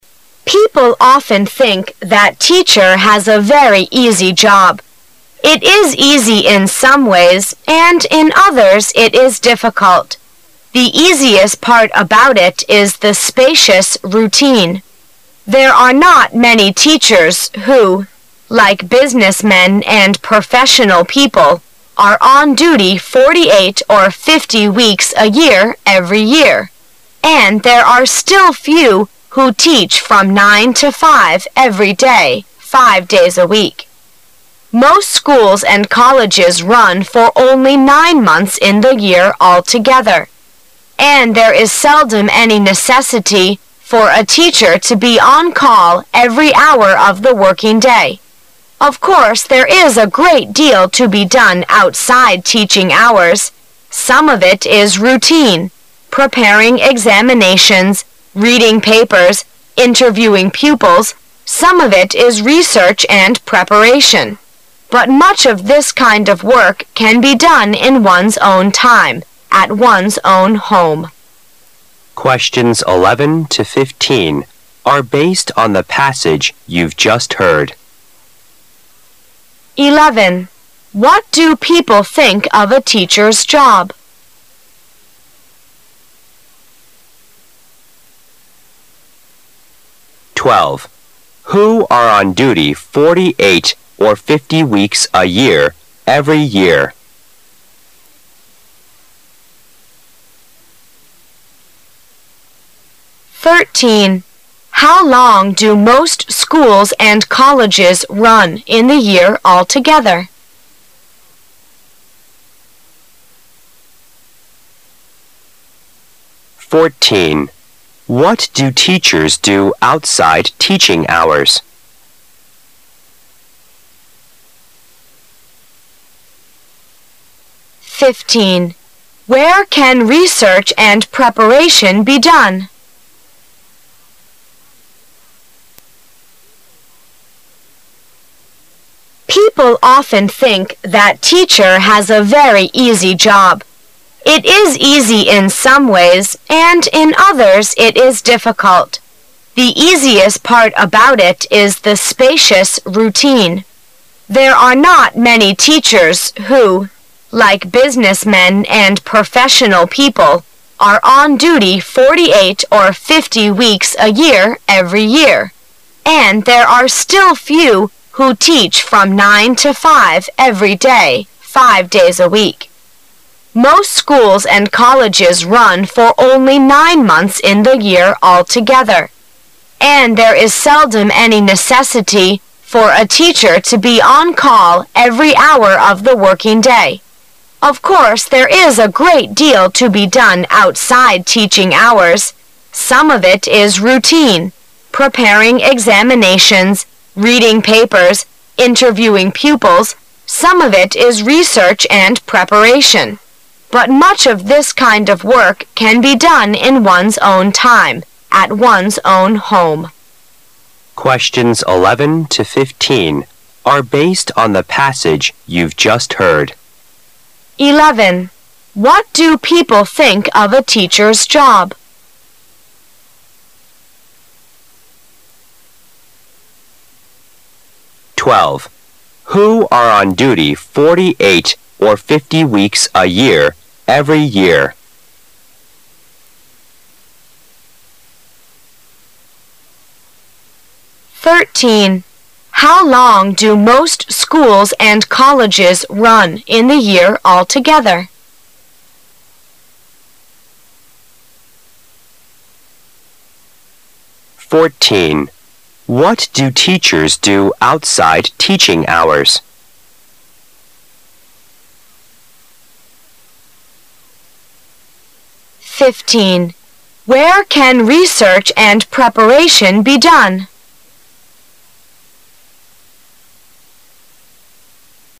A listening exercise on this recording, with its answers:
Section C Directions: This section is to test 3'our ability to comprehend short passages. You will hear a re corded passage. After that you will hear five questions. Both the passage and the questions will be read twice. When you hear a question, you should complete the answer to it with a word or a short phrase ( in no more than 3 words). The questions and incomplete answers are printed in your test paper. You should write your answers on the Answer Sheet correspondingly. Now the passage will begin.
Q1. What do people think of a teacher's job? People often think that a teacher's job is______.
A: very easy

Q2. Who are on duty forty-eight or fifty weeks a year every year? Business men and______.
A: professional people

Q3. How long do most schools and colleges run in the year alto gether?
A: Nine months

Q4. What do teachers do outside teaching hours? Preparing examinations, reading papers and______.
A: interviewing pupils

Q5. Where can research and preparation be done? This kind of work can be done at______.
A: one's own home

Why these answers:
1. 由问题和答案的其他部分可知这里需要填人一个修饰teacher's job的形容词。在录音的开头,一定要注意力集中,因为开头是很重要的,有些人的观点和立场会很鲜明的摆在开头。根据People of- ten think that teacher has a very easy job.可以写出答案,
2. 由问题和答案的其他部分可知这里需要填入一个和businessmen并列的名词。在解释教师工作看似简单的时候,原文中提到了只有一些老师like businessmen and professional people,are on duty forty-eight or fifty weeks a year every year,所以可写出答案。
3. 由问题可知这里需要填入表示时间的名词短语。原文中直接提到了Most schools and colleges run for only nine months in the year alto gether,所以答案是nine months。
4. 由问题和答案的其他部分可知这里需要填入动词+ing的短语形式,原文中首先提到了Of course,there is a great deal to be done outside teaching hours.这时需要格外注意,要提到具体的细节了, its routine主要包括prepanng examinations,reading papers,以及interviewing pupils。

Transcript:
[解析] 11-15 People often think that teacher has a very easy job. It is easy in some ways, and in others it is difficult. The easiest part about it is the spacious routine. There are not many teachers who, like businessmen and professional people, are on duty forty-eight or fifty weeks a year every year; and there are still few who teach from nine to five every (lay, five days a week. Most schools and colleges run for only nine months in the year alto gether, and there is seldom any necessity for a teacher to be on call every hour of the working day. Of course, there is a great deal to be done outside teaching hours. Some of it is routine -- preparing examinations, reading papers, interviewing pupils. Some of it is research and preparation. )3ut much of this kind of work can be done in one's own time, at one sown home.